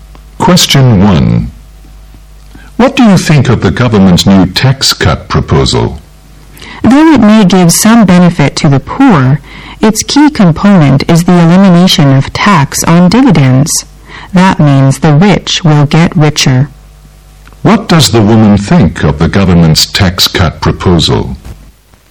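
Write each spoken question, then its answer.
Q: What does the woman think of the government's tax cut proposal?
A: It will mainly benefit the rich.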